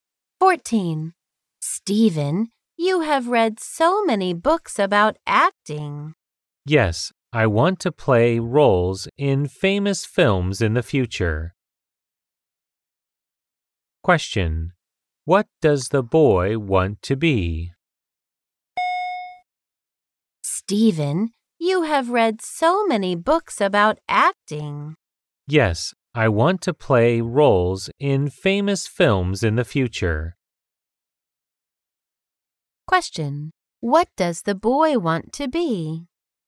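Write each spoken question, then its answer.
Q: What does the boy want to be?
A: An actor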